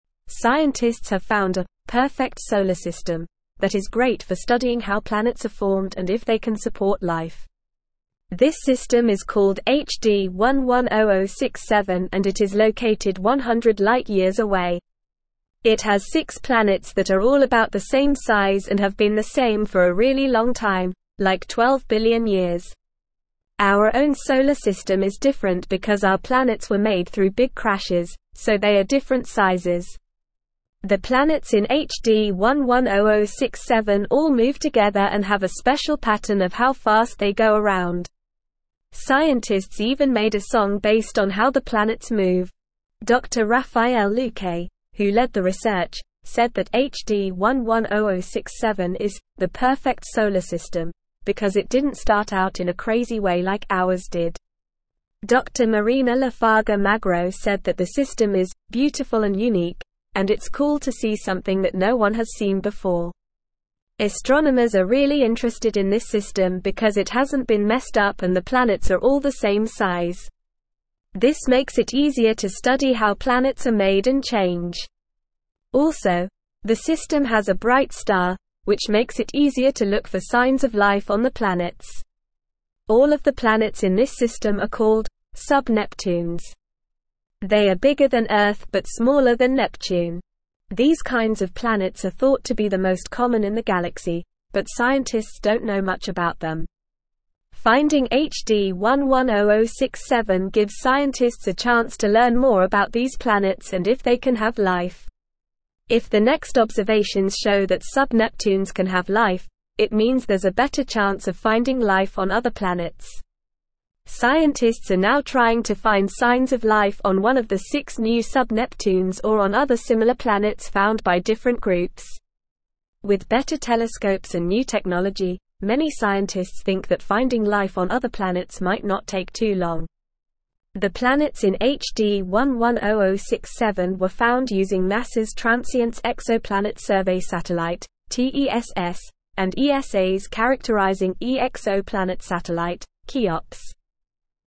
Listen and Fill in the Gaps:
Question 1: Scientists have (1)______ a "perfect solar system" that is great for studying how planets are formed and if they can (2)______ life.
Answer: found

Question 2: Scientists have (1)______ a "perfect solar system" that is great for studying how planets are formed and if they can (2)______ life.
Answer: support

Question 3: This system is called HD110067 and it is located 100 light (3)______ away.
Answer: years

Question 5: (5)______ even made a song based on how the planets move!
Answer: Scientists

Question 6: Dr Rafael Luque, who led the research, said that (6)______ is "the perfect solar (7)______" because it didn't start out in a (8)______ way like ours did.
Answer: HD110067

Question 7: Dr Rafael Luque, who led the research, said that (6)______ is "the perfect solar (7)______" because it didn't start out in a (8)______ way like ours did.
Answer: system

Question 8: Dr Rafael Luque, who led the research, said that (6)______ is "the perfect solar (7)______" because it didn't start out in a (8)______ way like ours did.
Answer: crazy

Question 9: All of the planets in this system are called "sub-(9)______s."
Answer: Neptune

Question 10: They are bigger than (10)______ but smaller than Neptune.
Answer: Earth

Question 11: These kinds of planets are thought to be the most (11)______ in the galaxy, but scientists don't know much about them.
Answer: common

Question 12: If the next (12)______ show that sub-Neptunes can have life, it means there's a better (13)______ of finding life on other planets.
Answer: observations

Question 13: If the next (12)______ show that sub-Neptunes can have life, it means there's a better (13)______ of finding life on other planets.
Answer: chance

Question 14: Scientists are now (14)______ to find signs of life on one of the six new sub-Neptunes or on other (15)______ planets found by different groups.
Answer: trying

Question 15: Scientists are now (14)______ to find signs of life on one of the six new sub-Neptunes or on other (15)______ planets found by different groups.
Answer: similar

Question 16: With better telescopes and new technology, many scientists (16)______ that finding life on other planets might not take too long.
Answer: think

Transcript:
Scientists have found a "perfect solar system" that is great for studying how planets are formed and if they can support life. This system is called HD110067 and it is located 100 light years away. It has six planets that are all about the same size and have been the same for a really long time, like 12 billion years. Our own solar system is different because our planets were made through big crashes, so they are different sizes. The planets in HD110067 all move together and have a special pattern of how fast they go around. Scientists even made a song based on how the planets move!
Dr Rafael Luque, who led the research, said that HD110067 is "the perfect solar system" because it didn't start out in a crazy way like ours did. Dr Marina Lafarga-Magro said that the system is "beautiful and unique" and it's cool to see something that no one has seen before. Astronomers are really interested in this system because it hasn't been messed up and the planets are all the same size. This makes it easier to study how planets are made and change. Also, the system has a bright star, which makes it easier to look for signs of life on the planets.
All of the planets in this system are called "sub-Neptunes." They are bigger than Earth but smaller than Neptune. These kinds of planets are thought to be the most common in the galaxy, but scientists don't know much about them. Finding HD110067 gives scientists a chance to learn more about these planets and if they can have life. If the next observations show that sub-Neptunes can have life, it means there's a better chance of finding life on other planets.
Scientists are now trying to find signs of life on one of the six new sub-Neptunes or on other similar planets found by different groups. With better telescopes and new technology, many scientists think that finding life on other planets might not take too long.

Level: Level 3